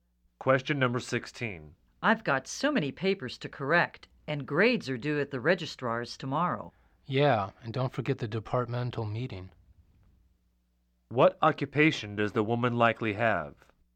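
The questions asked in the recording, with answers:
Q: What occupation does the woman likely have?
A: Teacher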